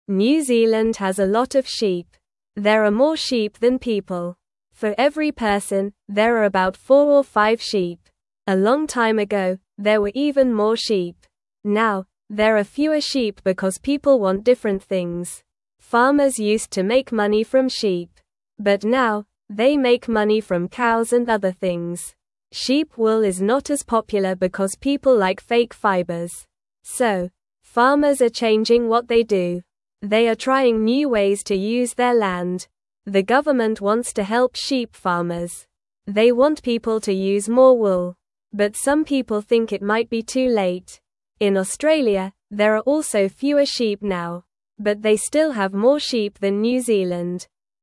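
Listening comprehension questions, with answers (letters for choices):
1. What did farmers used to make money from?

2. What does the government want to help sheep farmers do?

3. Are there more sheep in Australia or New Zealand?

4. What are farmers trying to do with their land now?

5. What animal is very common in New Zealand?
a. Cows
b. Dogs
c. Cats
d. Sheep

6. What do farmers in New Zealand make money from now?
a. Cows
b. Cats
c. Fish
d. Birds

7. Who wants to help sheep farmers?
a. The government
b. The farmers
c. The cows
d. The sheep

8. What do some people think about using wool?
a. It is very good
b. It might be too late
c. It is not nice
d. It is very cheap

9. Which country has more sheep than New Zealand?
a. Canada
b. Japan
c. China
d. Australia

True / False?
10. Australia has more sheep than New Zealand.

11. People like fake fibers more than sheep wool now.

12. The government wants to help goat farmers.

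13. Now, farmers make money from pigs and other things.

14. New Zealand has many sheep.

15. There are more people than sheep in New Zealand.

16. Farmers used to make money from sheep.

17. For every person, there are about 2 or 3 sheep.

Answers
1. Farmers used to make money from sheep.
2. The government wants to help sheep farmers use more wool.
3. There are more sheep in Australia than in New Zealand.
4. Farmers are trying new ways to use their land now.
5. d
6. a
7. a
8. b
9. d
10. True
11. True
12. False
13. False
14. True
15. False
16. True
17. False

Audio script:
New Zealand has a lot of sheep. There are more sheep than people. For every person, there are about 4 or 5 sheep. A long time ago, there were even more sheep. Now, there are fewer sheep because people want different things.
But now, they make money from cows and other things. Sheep wool is not as popular because people like fake fibers. 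So, farmers are changing what they do. They are trying new ways to use their land.
The government wants to help sheep farmers. They want people to use more wool. But some people think it might be too late. In Australia, there are also fewer sheep now. But they still have more sheep than New Zealand.

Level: Level 1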